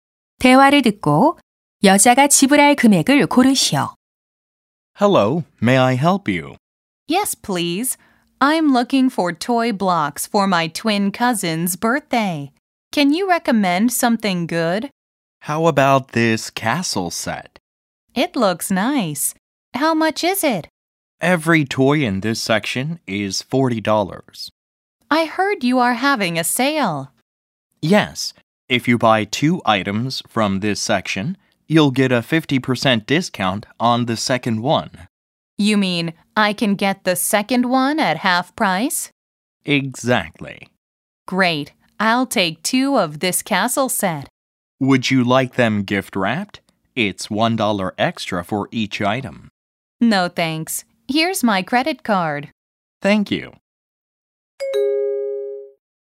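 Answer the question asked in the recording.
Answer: $60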